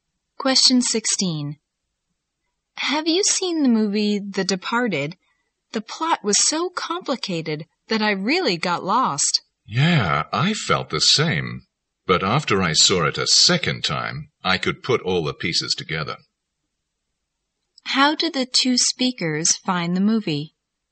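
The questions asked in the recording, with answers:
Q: How did the two speakers find the movie?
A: Confusing; hard to follow the first time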